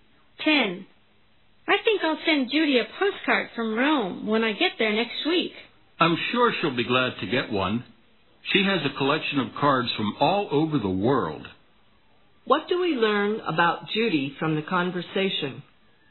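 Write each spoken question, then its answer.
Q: What do we learn about Judy from the conversation?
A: She collects postcards from all over the world.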